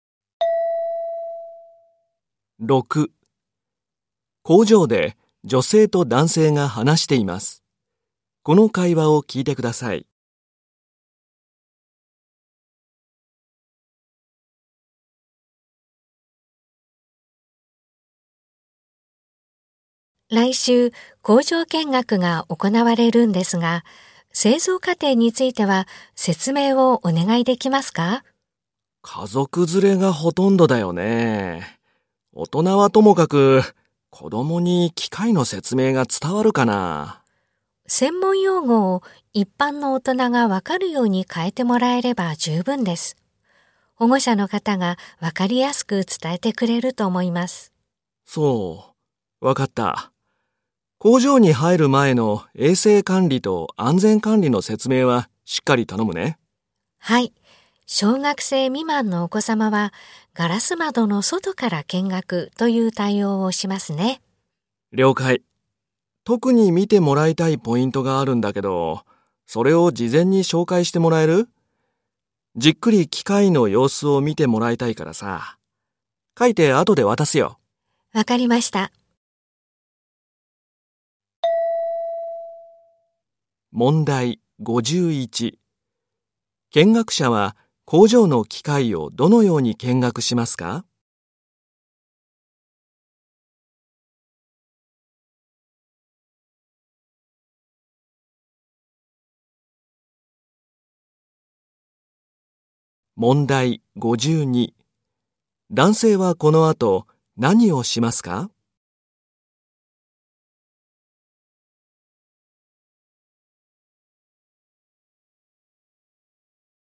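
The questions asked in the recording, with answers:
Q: 男性はこの後何をしますか?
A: 見てもらいたいポイントを書いて渡す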